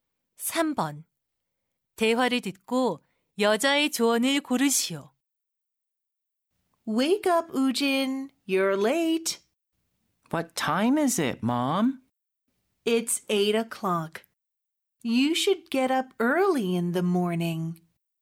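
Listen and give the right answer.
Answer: 아침에 일찍 일어나라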